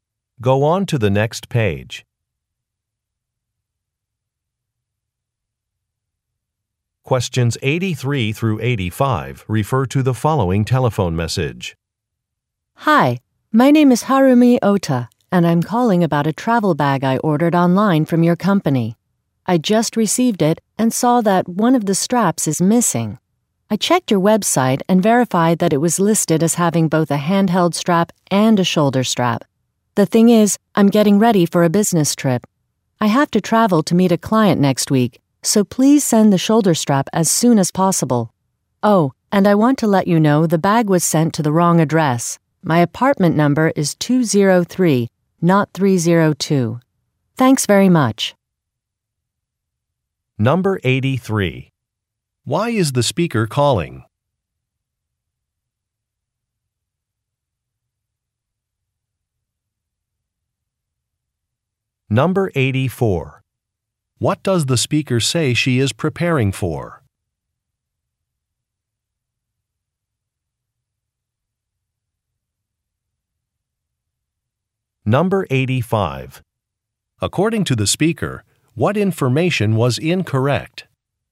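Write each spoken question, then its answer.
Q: Why is the speaker calling?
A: A strap is missing from her bag

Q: What does the speaker say she is preparing for?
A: A business trip

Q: According to the speaker, what information was incorrect?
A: Her apartment number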